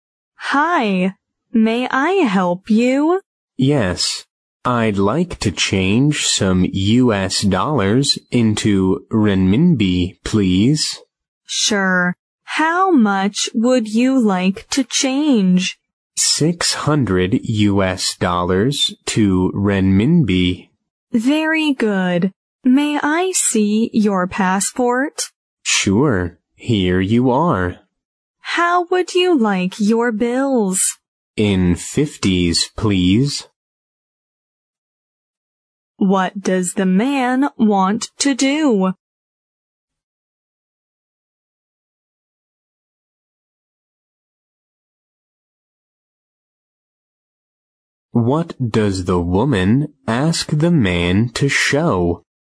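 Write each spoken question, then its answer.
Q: What does the man want to do?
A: Change U.S. dollars into renminbi

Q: What does the woman ask the man to show?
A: His passport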